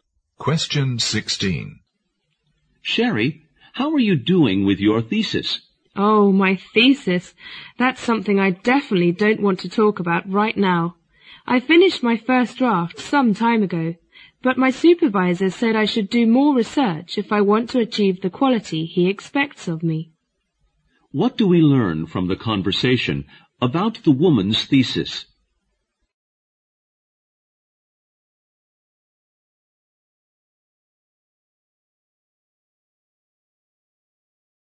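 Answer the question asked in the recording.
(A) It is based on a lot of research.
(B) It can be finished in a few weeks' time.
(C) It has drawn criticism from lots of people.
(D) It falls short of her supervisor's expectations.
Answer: (D) It falls short of her supervisor's expectations.

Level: 六级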